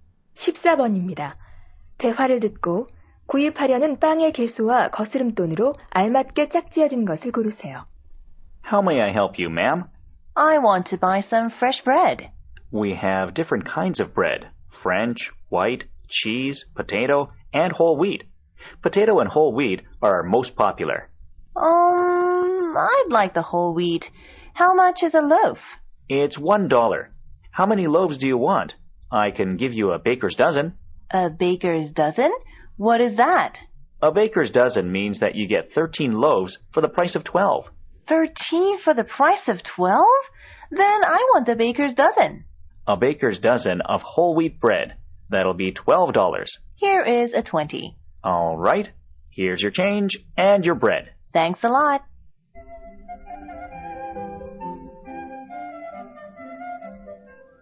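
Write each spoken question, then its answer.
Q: 대화를 듣고 구입하려는 빵의 개수와 거스름돈으로 알맞게 짝지어진 것을 고르세요.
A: 13개, 8달러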